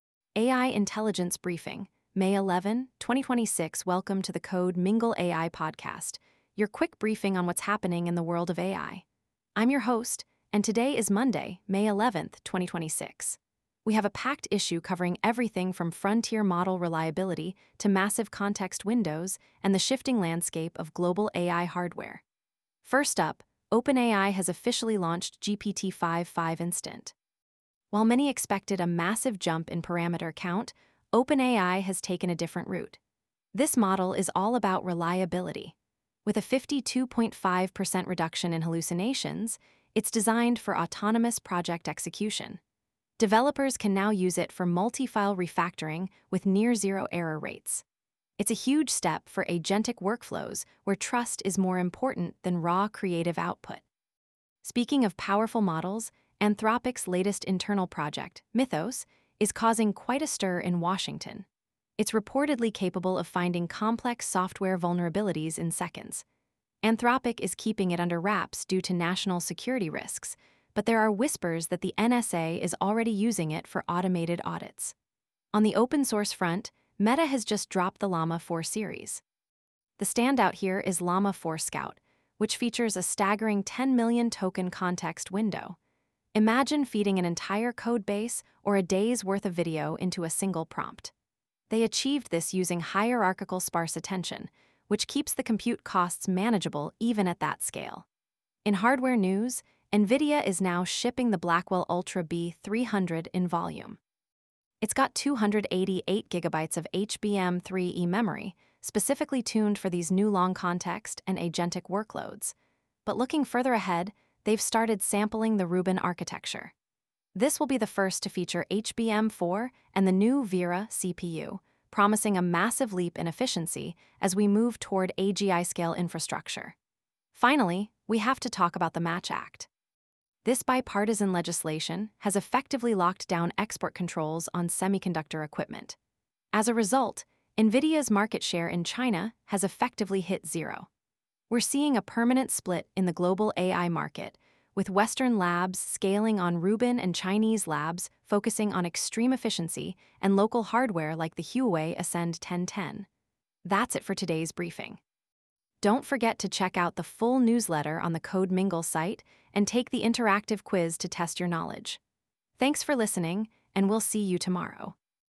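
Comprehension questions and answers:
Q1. What is the primary focus of the newly released OpenAI GPT-5.5 Instant?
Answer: High-fidelity reliability and reduction in hallucinations

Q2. Which Meta Llama 4 model features a 10-million token context window?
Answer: Llama 4 Scout

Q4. Which hardware architecture is expected to feature HBM4 memory and the 'Vera' CPU?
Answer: Rubin

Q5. What is the name of the bipartisan legislation advanced to tighten export controls on semiconductor equipment?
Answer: The MATCH Act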